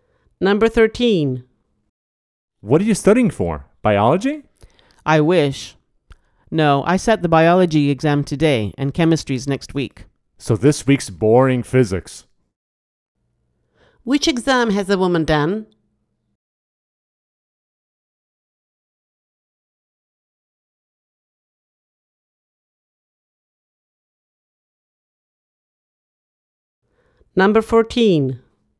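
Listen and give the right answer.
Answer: Biology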